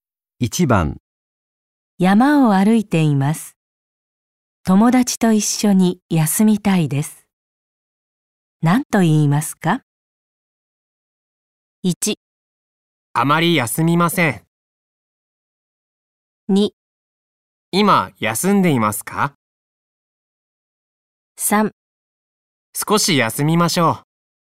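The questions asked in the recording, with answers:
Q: 山を歩いています。友達と一緒に休みたいです。何と言いますか?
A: 3: 少し休みましょう。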